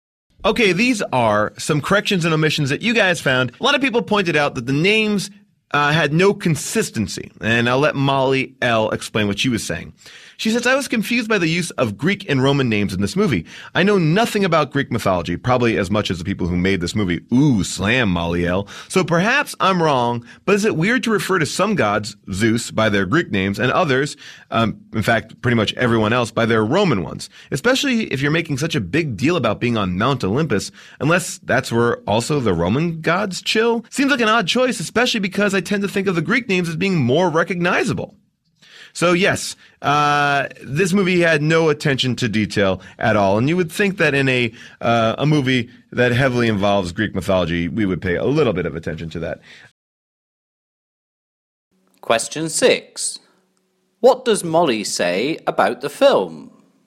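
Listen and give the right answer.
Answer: She was confused by its mix of Greek and Roman names for the gods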